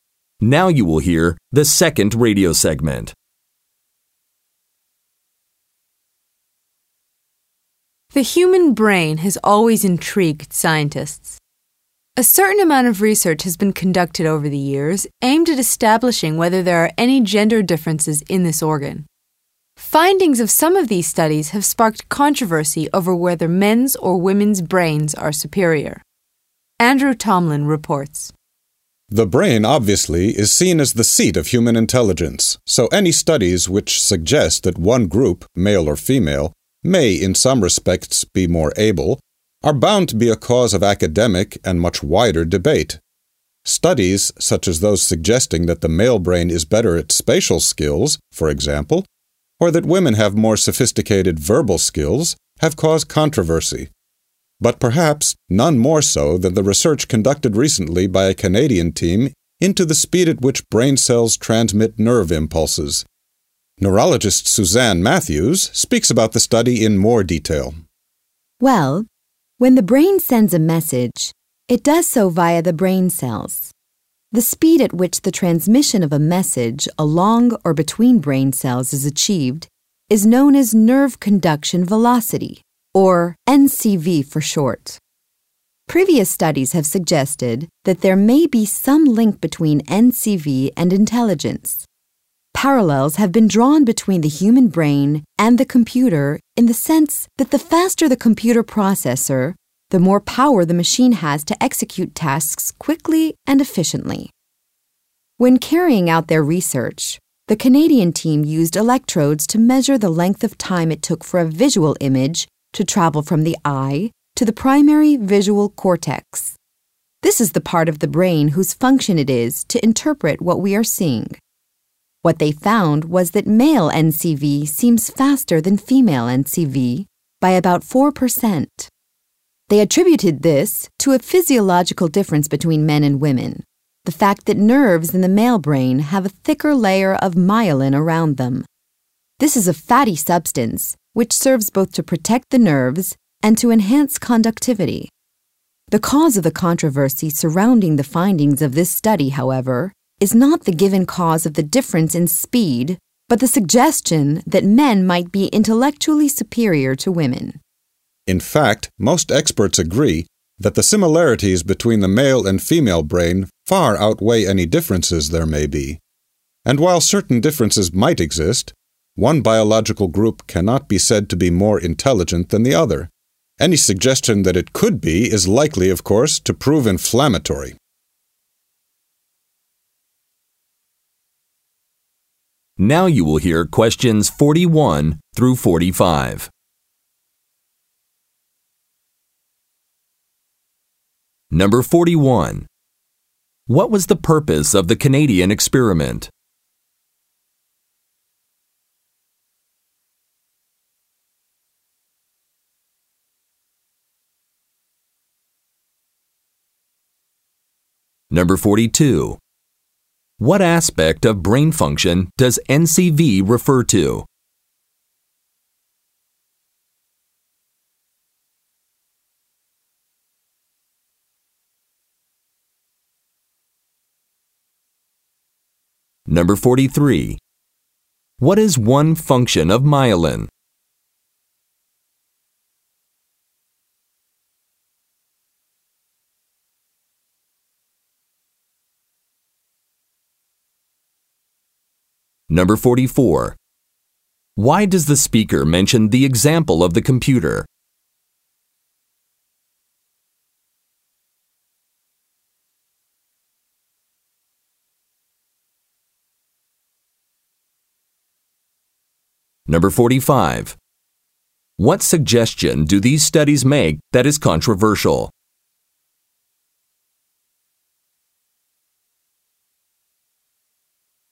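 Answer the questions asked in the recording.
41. To measure how fast brain cells transmit nerve impulses (NCV) in men and women
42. The speed at which messages travel along or between brain cells
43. It protects the nerves and improves conductivity
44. To show the possible link between processing speed and intelligence
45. That men might be intellectually superior to women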